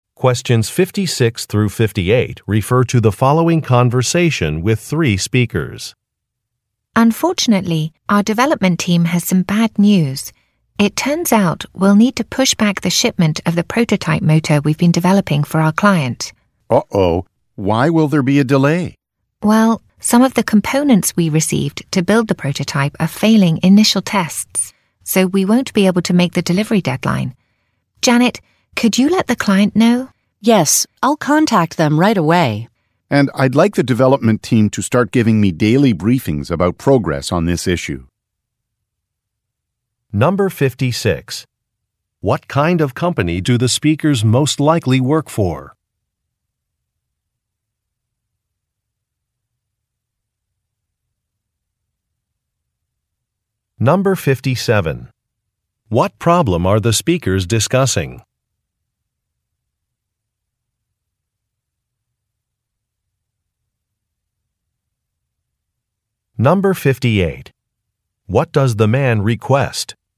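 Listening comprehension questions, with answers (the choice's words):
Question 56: What kind of company do the speakers most likely work for?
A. Manufacturing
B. Financial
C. Publishing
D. Educational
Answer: Manufacturing

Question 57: What problem are the speakers discussing?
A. A pause while more funding is obtained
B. A delay in making a delivery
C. A need for the company to relocate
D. The loss of some experienced staff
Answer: A delay in making a delivery

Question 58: What does the man request?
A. A report from the client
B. A faster pace of work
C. Additional employees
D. Daily updates from the team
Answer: Daily updates from the team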